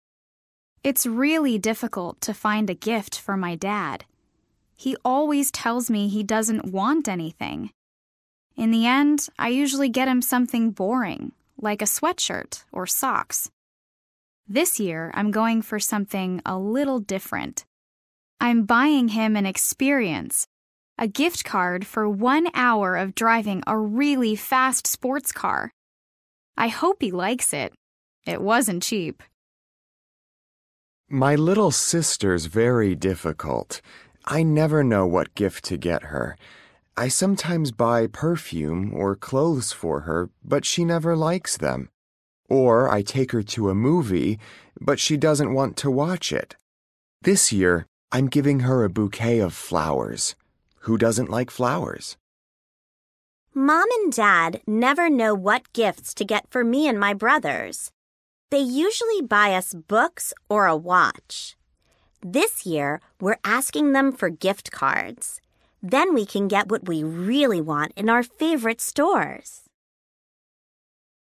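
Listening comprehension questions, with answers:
Listen again and read. Why are these people difficult to buy gifts for?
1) Lara's dad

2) Rosa and her brothers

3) Hasan's sister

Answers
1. He always says he doesn't want anything.
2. Their parents never know what to get; they usually buy books or a watch.
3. She never likes the gifts he buys her.

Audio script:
It's really difficult to find a gift for my dad. He always tells me he doesn't want anything. In the end, I usually get him something boring like a sweatshirt or socks. This year I'm going for something a little different. I'm buying him an experience – a gift card, for one hour of driving a really fast sports car. I hope he likes it. It wasn't cheap!
My little sister's very difficult. I never know what gift to get her. I sometimes buy perfume or clothes for her, but she never likes them. Or I take her to a movie, but she doesn't want to watch it. 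This year I'm giving her a bouquet of flowers. Who doesn't like flowers?
Mom and dad never know what gifts to get for me and my brothers. They usually buy us books or a watch. This year we're asking them for gift cards. Then we can get what we really want in our favorite stores.

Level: A2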